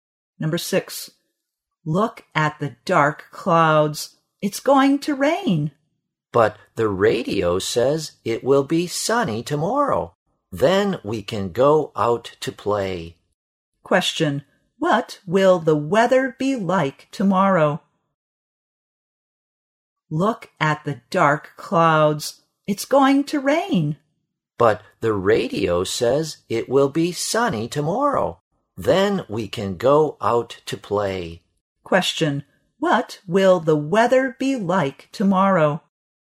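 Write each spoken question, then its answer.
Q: what will the weather be like tomorrow?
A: Sunny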